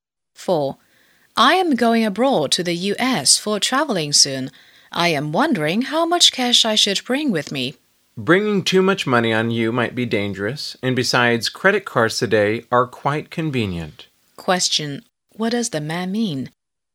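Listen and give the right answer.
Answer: She shouldn't bring too much cash; use credit cards instead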